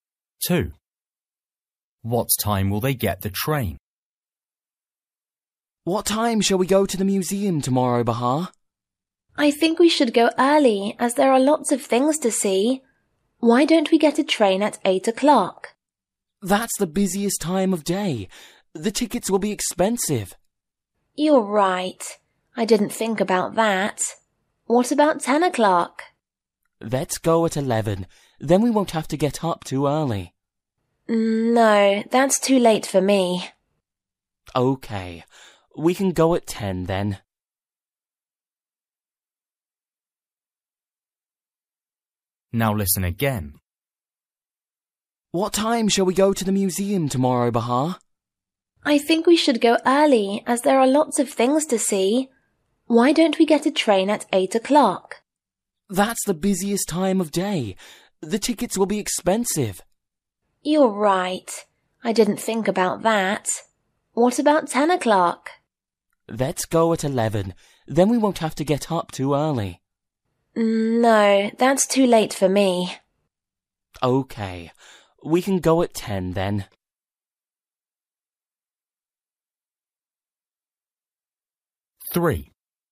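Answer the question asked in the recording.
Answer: At 10 o'clock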